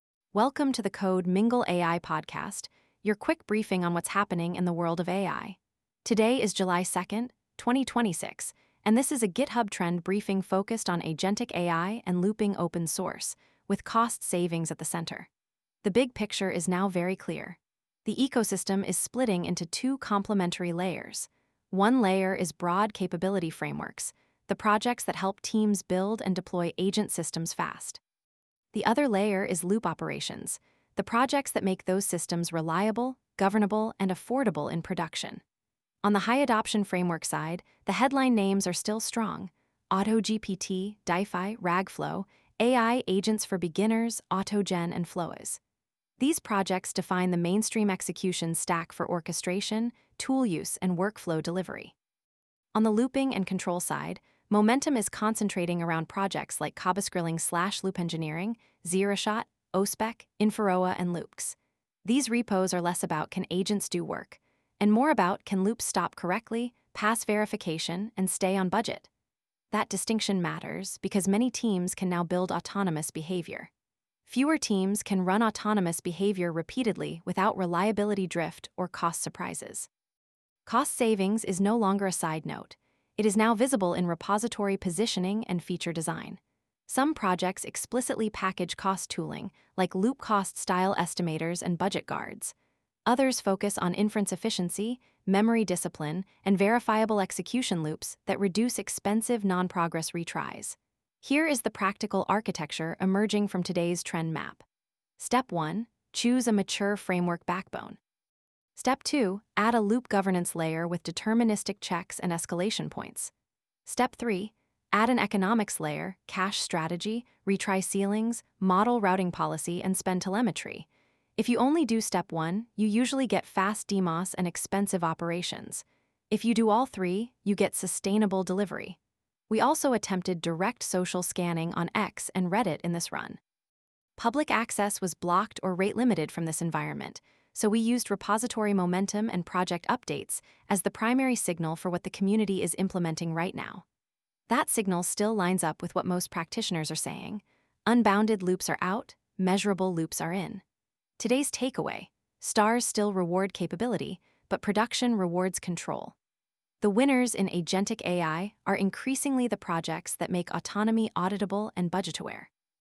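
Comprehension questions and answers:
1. What is the clearest July 2 pattern across agentic and looping OSS?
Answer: Capability frameworks are growing alongside control-and-cost loop tooling.

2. Why are loop-specific repos gaining traction?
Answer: They add verification, stop conditions, and operational guardrails around autonomous runs.

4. What is the safest rollout strategy for autonomous loops?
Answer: Framework first, then loop gates, then economics controls before scaling autonomy.

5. Why is cost savings becoming a product feature in OSS?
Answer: Teams need sustainable, repeatable loops, so projects are shipping audit/cost primitives directly.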